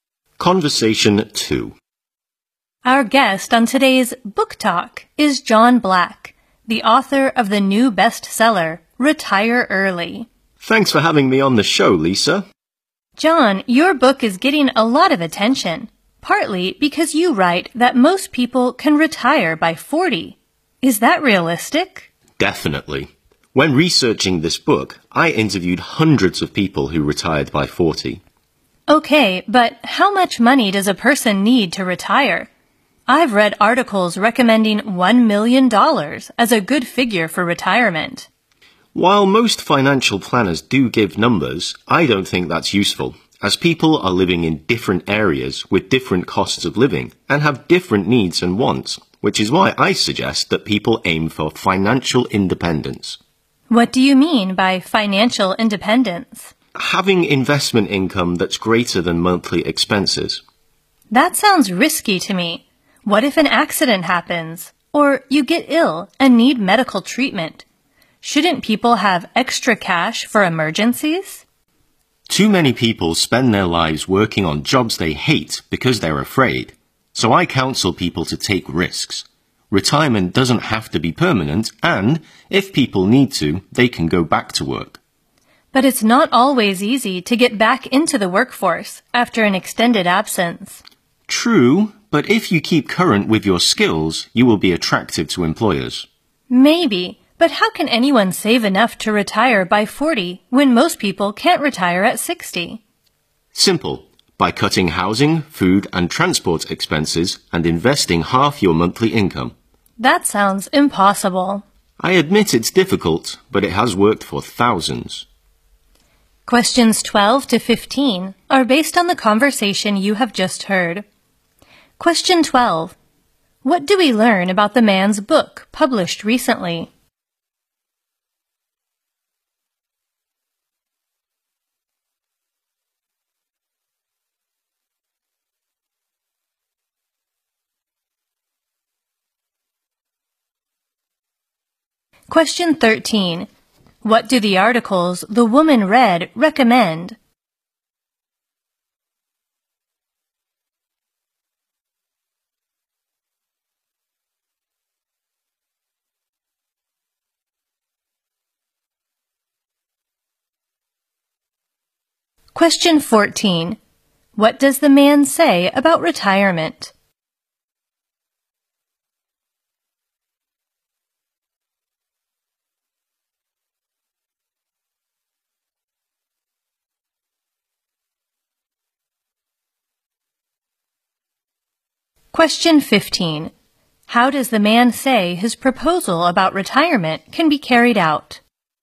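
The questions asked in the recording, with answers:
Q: What do we learn about the man's book published recently?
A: It is a bestseller that is getting a lot of attention.

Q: What do the articles the woman read recommend?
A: Having $1 million for retirement.

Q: What does the man say about retirement?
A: It doesn't have to be permanent; people can go back to work.

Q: How does the man say his proposal about retirement can be carried out?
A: By cutting housing, food and transport costs and investing half of monthly income.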